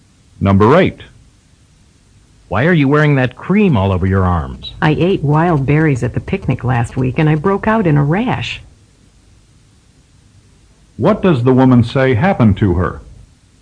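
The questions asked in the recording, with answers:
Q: What does the woman say happened to her?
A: She broke out in a rash after eating wild berries.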